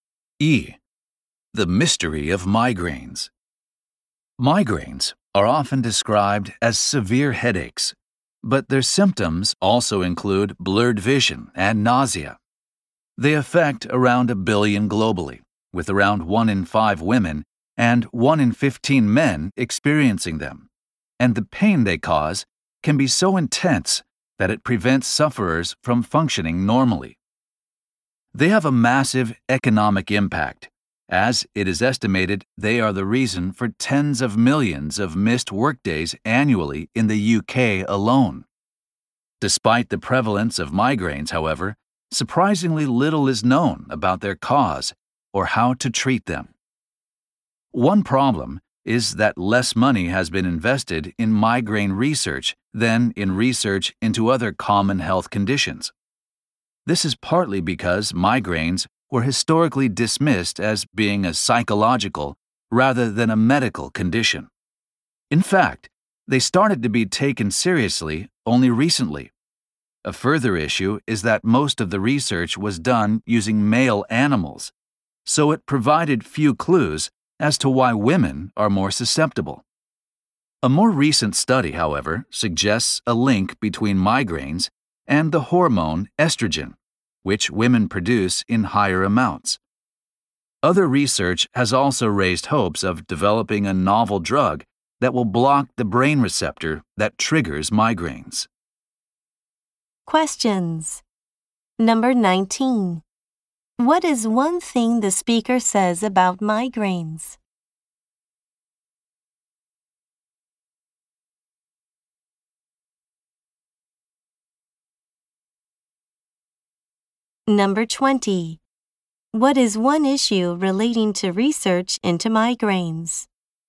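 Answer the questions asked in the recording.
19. They have a huge economic impact, causing tens of millions of missed workdays each year in the UK.
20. It has received less money than other conditions, and most studies used male animals.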